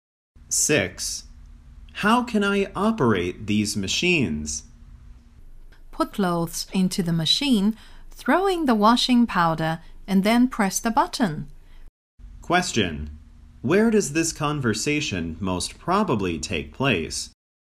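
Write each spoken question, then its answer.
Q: Where does this conversation most probably take place?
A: In a laundry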